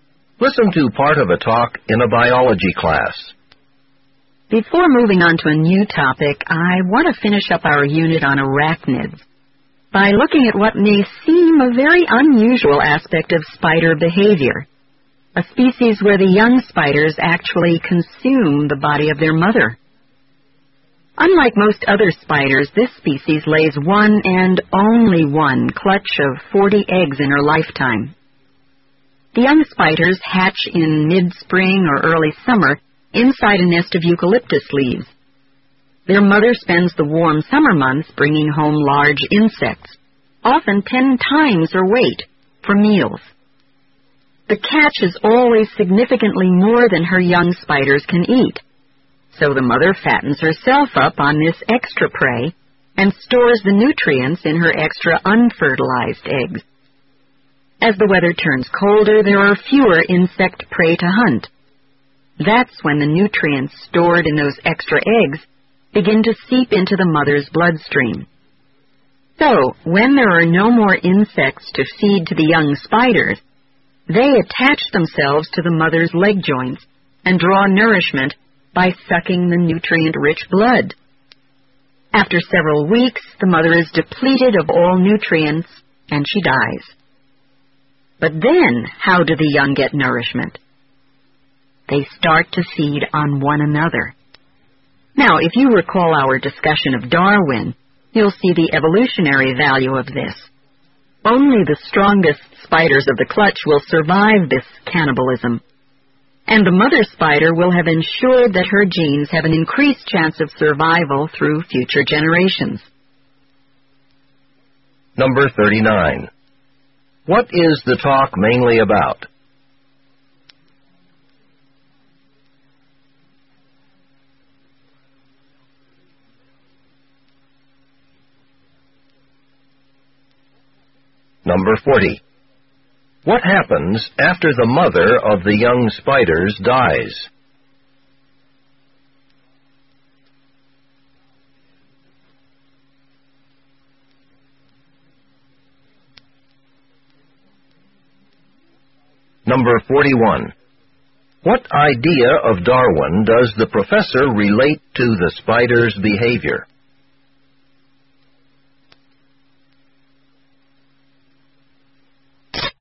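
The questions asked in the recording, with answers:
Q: What is the talk mainly about?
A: A spider species whose young consume the body of their mother

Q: What happens after the mother of the young spiders dies?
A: The young spiders feed on one another

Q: What idea of Darwin does the professor relate to the spider's behavior?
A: Only the strongest survive, so the mother's genes have a better chance of surviving (survival of the fittest)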